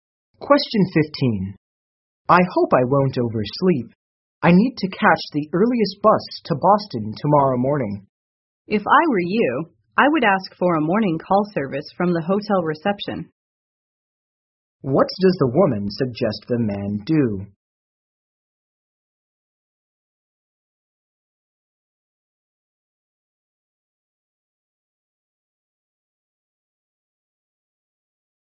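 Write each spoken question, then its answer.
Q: What does the woman suggest the man do?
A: Ask the hotel reception for a morning wake-up call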